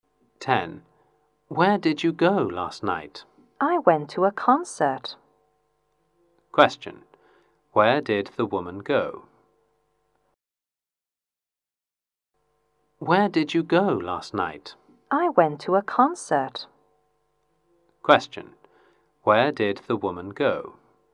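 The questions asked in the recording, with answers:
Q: Where did the woman go?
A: To a concert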